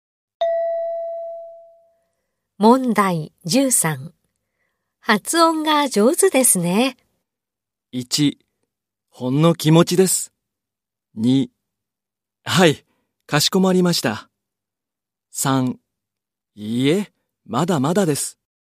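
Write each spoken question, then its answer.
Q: 発音が上手ですね。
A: 3: いいえ、まだまだです。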